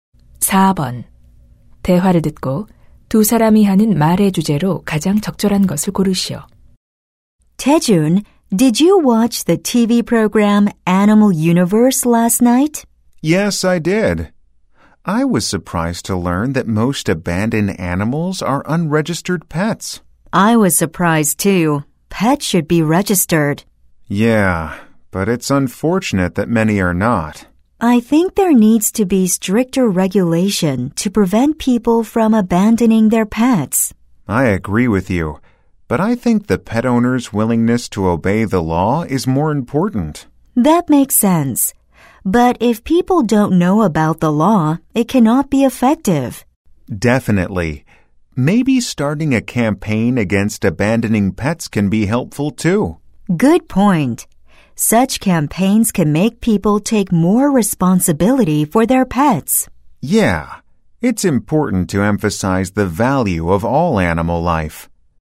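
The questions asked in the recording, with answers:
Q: 대화를 듣고 두 사람이 하는 말의 주제로 가장 적절한 것을 고르시오.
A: 반려동물 유기 방지 방안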